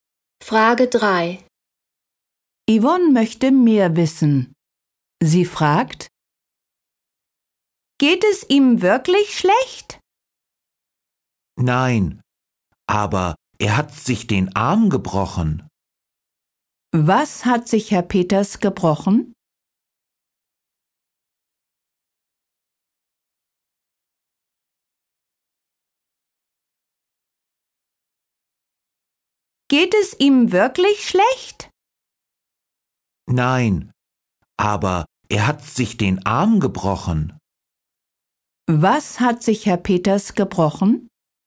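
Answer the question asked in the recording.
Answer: Den Arm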